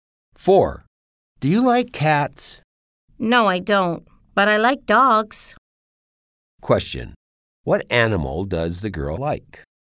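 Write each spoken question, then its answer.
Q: Question. What animal does the girl like?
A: Dogs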